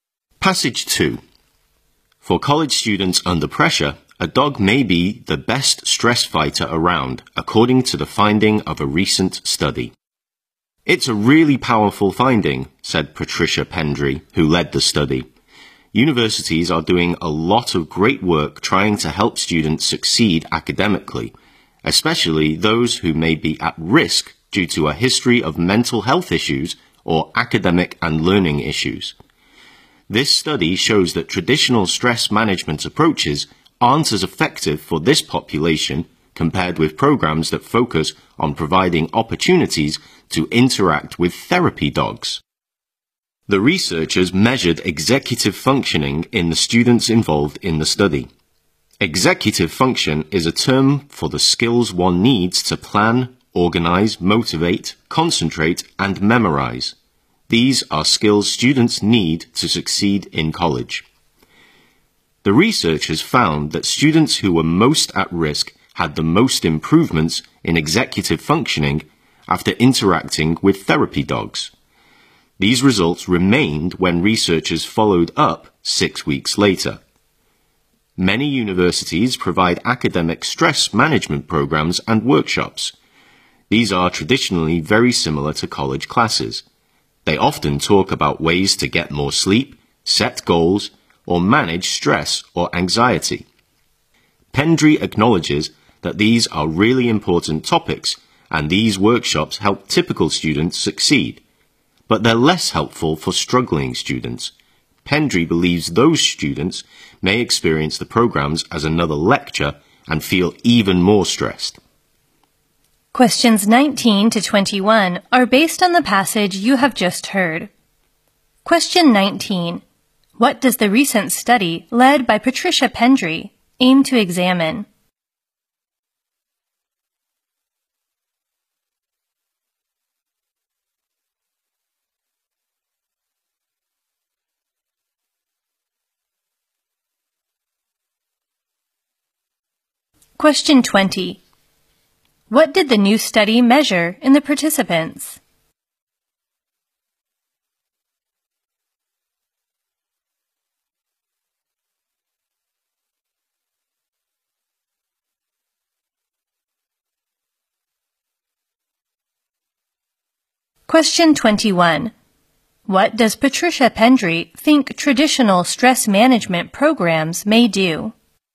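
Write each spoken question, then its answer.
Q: What did the new study measure in the participants?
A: Their executive functioning.

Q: What does Patricia Pendry think traditional stress management programs may do?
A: Make struggling students feel even more stressed.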